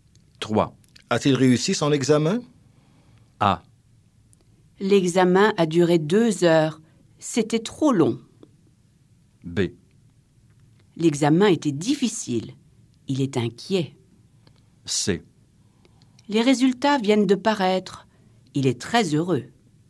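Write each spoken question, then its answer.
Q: A-t-il réussi son examen?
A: C: Les résultats viennent de paraître. Il est très heureux.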